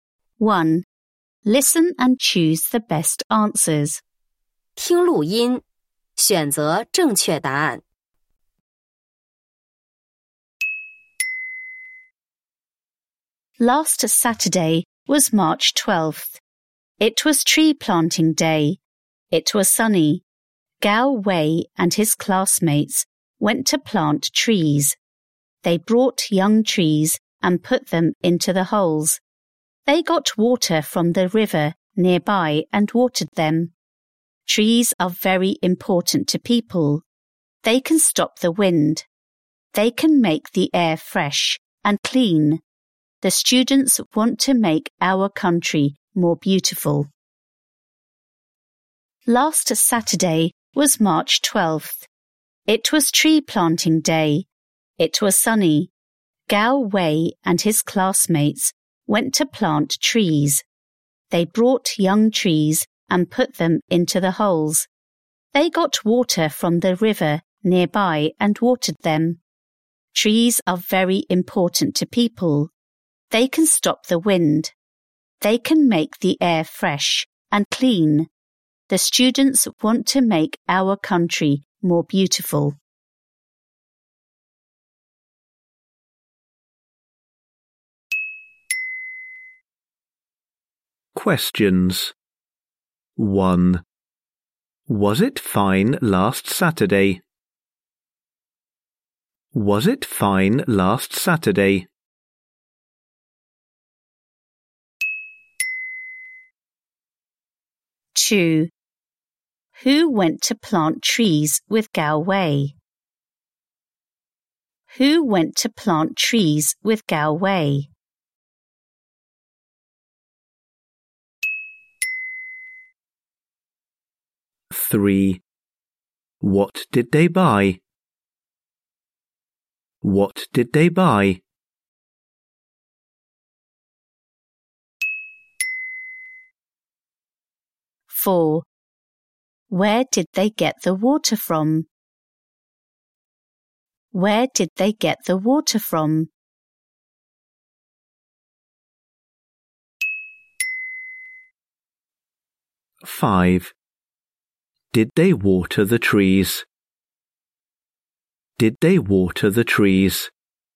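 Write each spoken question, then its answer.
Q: Was it fine last Saturday?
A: Yes, it was sunny.

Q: Who went to plant trees with Gao Wei?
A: His classmates.

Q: Where did they get the water from?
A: From the river nearby.

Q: Did they water the trees?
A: Yes, they did.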